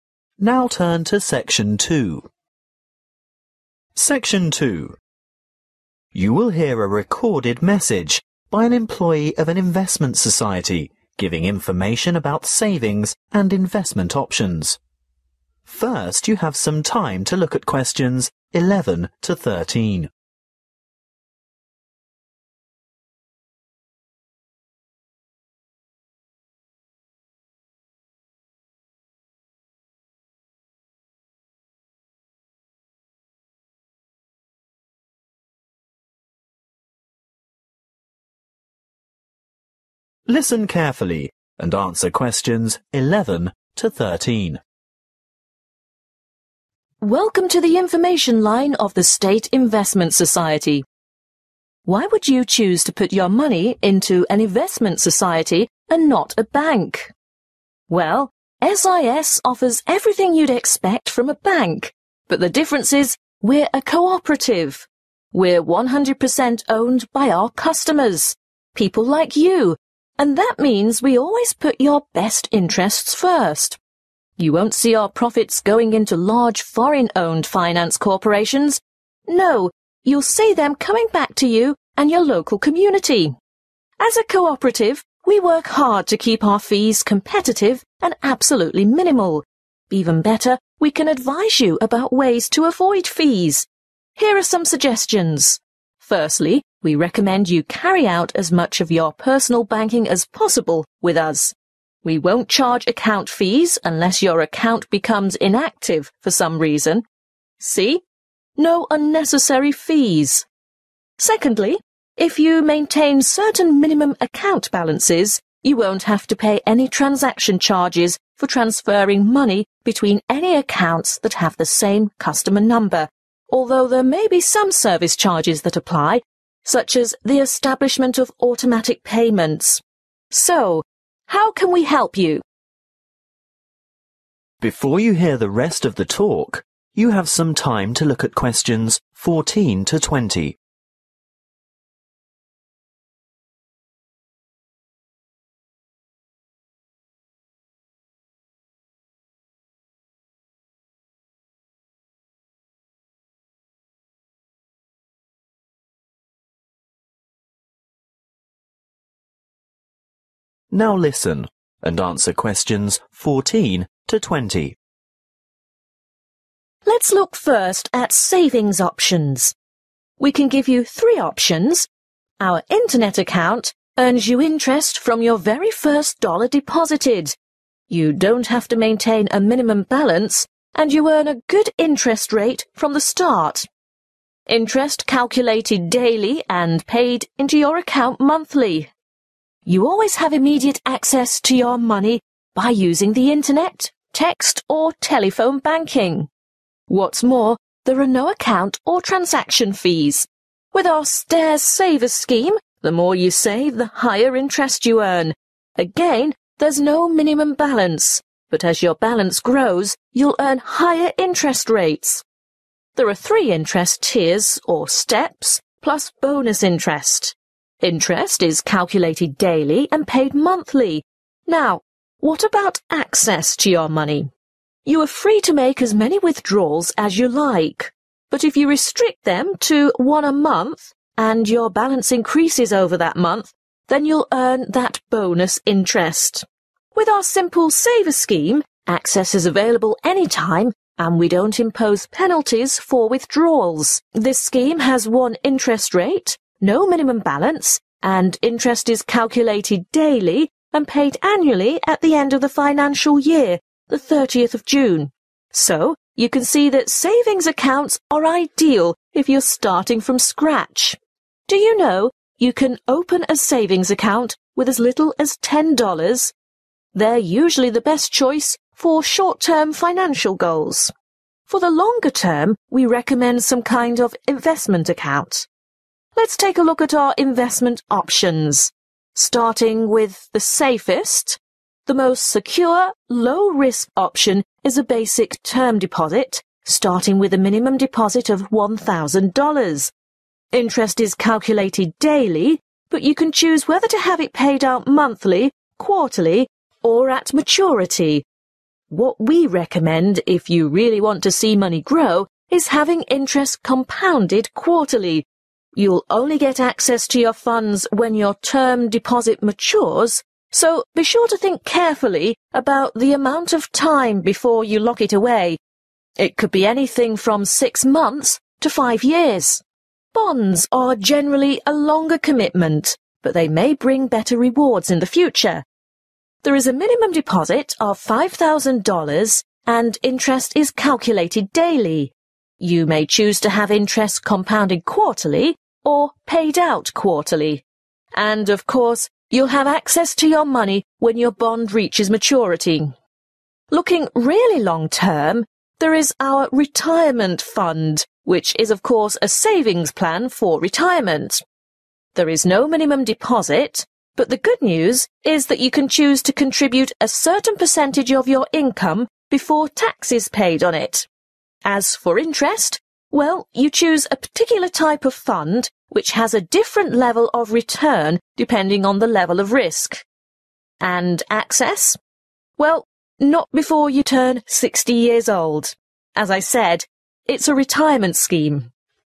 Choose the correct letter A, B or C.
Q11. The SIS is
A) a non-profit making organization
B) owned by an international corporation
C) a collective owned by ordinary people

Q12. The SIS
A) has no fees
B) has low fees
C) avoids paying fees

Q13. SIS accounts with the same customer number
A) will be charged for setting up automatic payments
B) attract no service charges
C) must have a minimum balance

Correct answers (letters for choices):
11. C
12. B
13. A